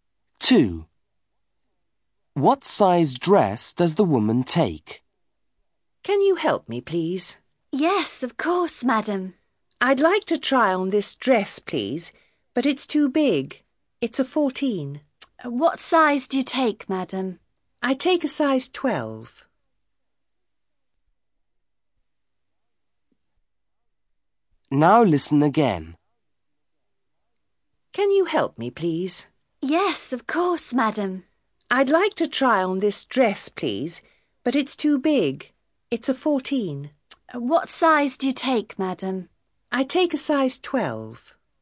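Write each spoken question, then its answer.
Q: What size dress does the woman take?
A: Size 12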